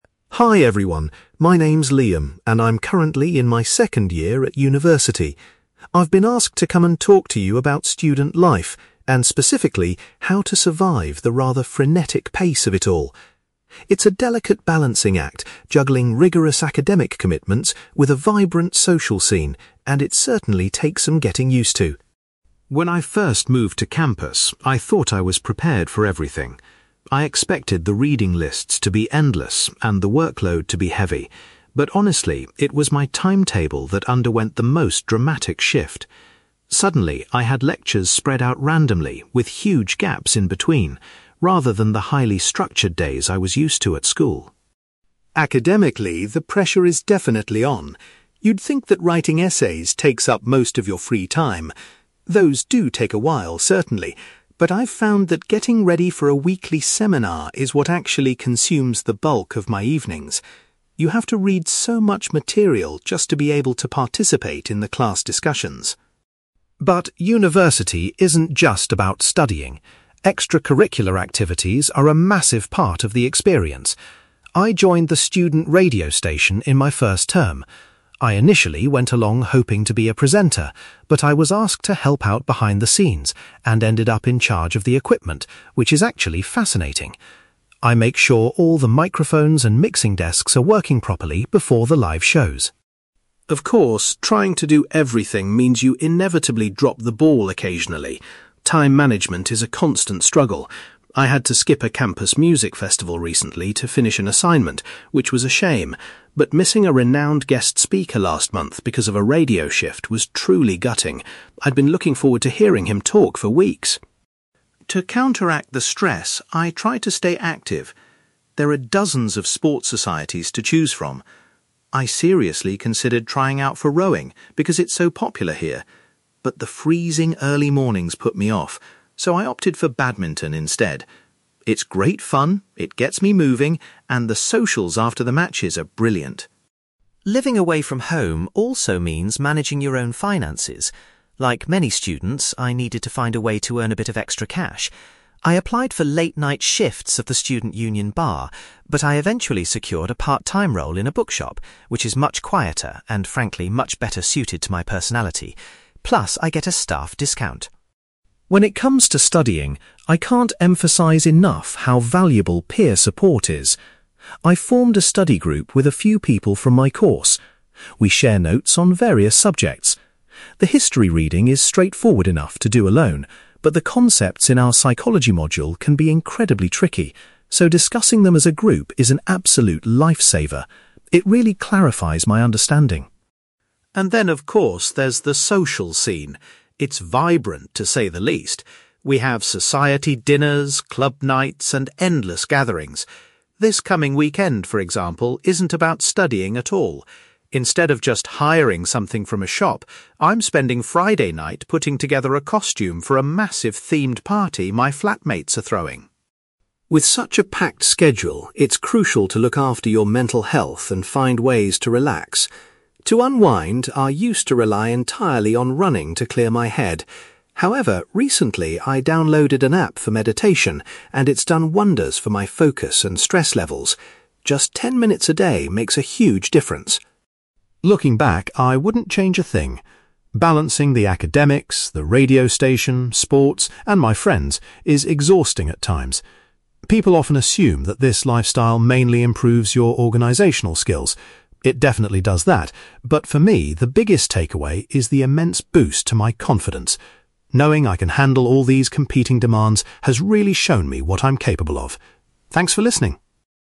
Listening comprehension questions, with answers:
You will hear a university student called Liam giving a talk about how he balances his academic studies and his social life. For questions 9-18, complete the sentences with a word or short phrase.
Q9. Liam was surprised by how much his (9)........................... changed when he started university.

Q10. Liam finds that preparing for a (10)........................... takes up most of his academic study time.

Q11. Liam's role at the student radio station primarily involves looking after the (11)........................... .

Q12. Liam was disappointed when he missed a talk by a famous (12)........................... because of a schedule clash.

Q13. To stay fit, Liam decided to join the university (13)........................... club.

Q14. Liam works a few hours a week in a local (14)........................... to earn extra money.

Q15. Liam finds his study group particularly helpful for his (15)........................... module.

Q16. For an upcoming social event, Liam has to make a (16)........................... .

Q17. Liam uses an app focused on (17)........................... to help him manage his stress levels.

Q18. Liam believes that juggling so many commitments has significantly increased his (18)........................... .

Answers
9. timetable
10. seminar
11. equipment
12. guest speaker
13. badminton
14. bookshop
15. psychology
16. costume
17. meditation
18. confidence

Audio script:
Liam: Hi everyone, my name's Liam, and I'm currently in my second year at university. I've been asked to come and talk to you about student life, and specifically, how to survive the rather frenetic pace of it all. It's a delicate balancing act, juggling rigorous academic commitments with a vibrant social scene, and it certainly takes some getting used to!
When I first moved to campus, I thought I was prepared for everything. I expected the reading lists to be endless and the workload to be heavy, but honestly, it was my timetable that underwent the most dramatic shift. Suddenly, I had lectures spread out randomly, with huge gaps in between, rather than the highly structured days I was used to at school.
Academically, the pressure is definitely on. You'd think that writing essays takes up most of your free time. Those do take a while, certainly, but I've found that getting ready for a weekly seminar is what actually consumes the bulk of my evenings. You have to read so much material just to be able to participate in the class discussions!
But university isn't just about studying. Extracurricular activities are a massive part of the experience. I joined the student radio station in my first term. I initially went along hoping to be a presenter, but I was asked to help out behind the scenes and ended up in charge of the equipment, which is actually fascinating. I make sure all the microphones and mixing desks are working properly before the live shows.
Of course, trying to do everything means you inevitably drop the ball occasionally. Time management is a constant struggle. I had to skip a campus music festival recently to finish an assignment, which was a shame, but missing a renowned guest speaker last month because of a radio shift was truly gutting. I'd been looking forward to hearing him talk for weeks!
To counteract the stress, I try to stay active. There are dozens of sports societies to choose from. I seriously considered trying out for rowing, because it's so popular here, but the freezing early mornings put me off, so I opted for badminton instead. It's great fun, it gets me moving, and the socials after the matches are brilliant.
Living away from home also means managing your own finances. Like many students, I needed to find a way to earn a bit of extra cash. I applied for late-night shifts at the student union bar, but I eventually secured a part-time role in a bookshop, which is much quieter and frankly, much better suited to my personality. Plus, I get a staff discount!
When it comes to studying, I can't emphasize enough how valuable peer support is. I've formed a study group with a few people from my course. We share notes on various subjects. The history reading is straightforward enough to do alone, but the concepts in our psychology module can be incredibly tricky, so discussing them as a group is an absolute lifesaver. It really clarifies my understanding.
And then, of course, there's the social scene. It's vibrant, to say the least! We have society dinners, club nights, and endless gatherings. This coming weekend, for example, isn't about studying at all. Instead of just hiring something from a shop, I'm spending Friday night putting together a costume for a massive themed party my flatmates are throwing.
With such a packed schedule, it's crucial to look after your mental health and find ways to relax. To unwind, I used to rely entirely on running to clear my head. However, recently I downloaded an app for meditation, and it's done wonders for my focus and stress levels. Just ten minutes a day makes a huge difference.
Looking back, I wouldn't change a thing. Balancing the academics, the radio station, sports, and my friends is exhausting at times. People often assume that this lifestyle mainly improves your organizational skills. It definitely does that, but for me, the biggest takeaway is the immense boost to my confidence. Knowing I can handle all these competing demands has really shown me what I'm capable of. Thanks for listening!

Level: B2